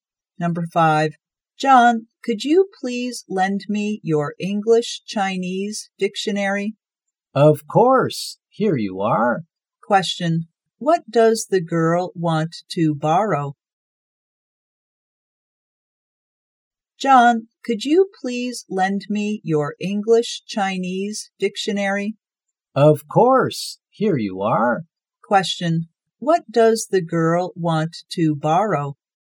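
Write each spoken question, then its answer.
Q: what does the girl want to borrow?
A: An English-Chinese dictionary.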